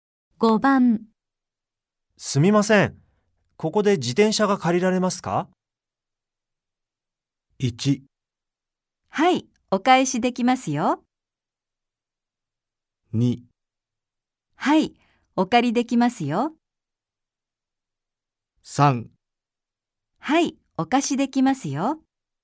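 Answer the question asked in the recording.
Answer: 3: はい、お貸しできますよ。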